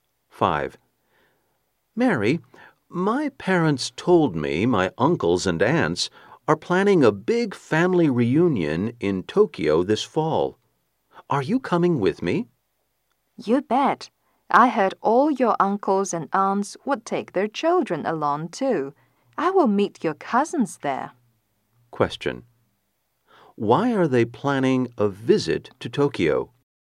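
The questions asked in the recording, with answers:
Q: Why are they planning a visit to Tokyo?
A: For a big family reunion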